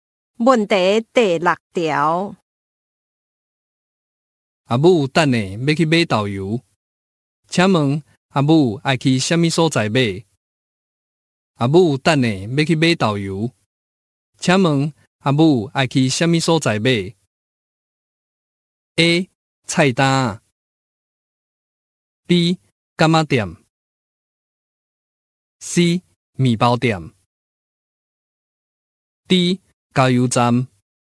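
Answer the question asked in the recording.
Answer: B: 干妈店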